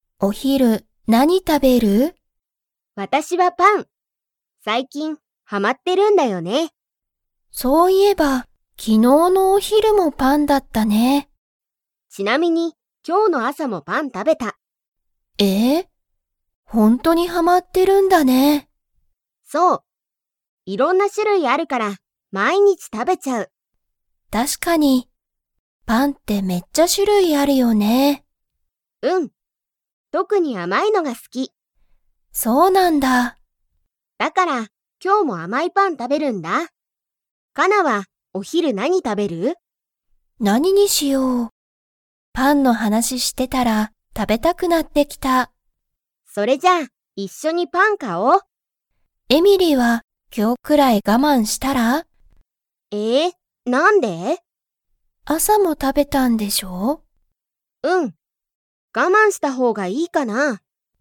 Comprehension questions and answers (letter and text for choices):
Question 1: エミリは昨日きのうのお昼ひる、パンを 。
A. 食たべた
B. 食たべてない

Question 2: エミリは特とくにどんなパンが好すきですか?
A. 安やすいパン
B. 高たかいパン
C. 大おおきいパン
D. 甘あまいパン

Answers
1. A. 食たべた
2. D. 甘あまいパン

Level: Level 4